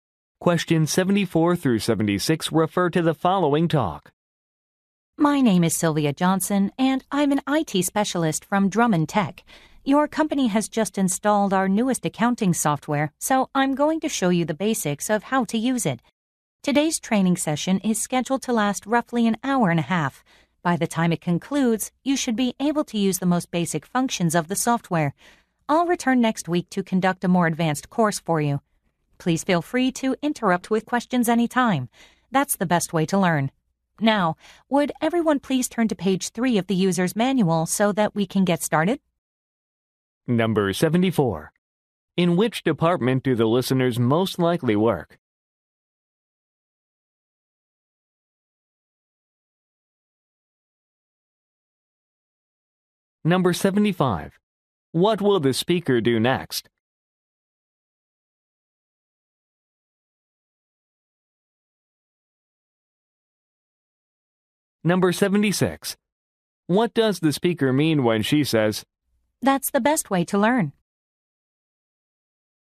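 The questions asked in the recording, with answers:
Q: In which department do the listeners most likely work?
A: Accounting

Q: What will the speaker do next?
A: Go through the user's manual starting on page 3

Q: What does the speaker mean when she says,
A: She encourages listeners to ask questions anytime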